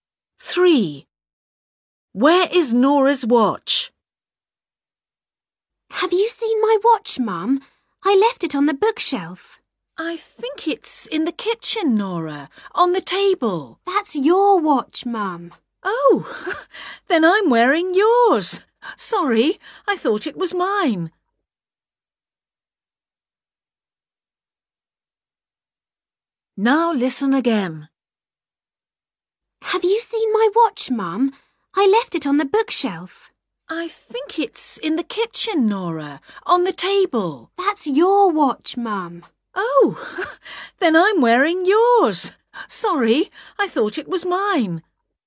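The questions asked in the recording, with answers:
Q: Where is Nora's watch?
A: Her mum is wearing it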